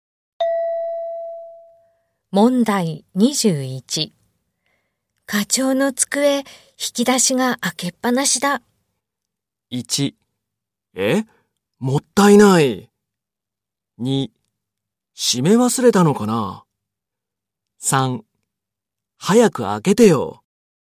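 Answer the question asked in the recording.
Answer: 2: 閉め忘れたのかな。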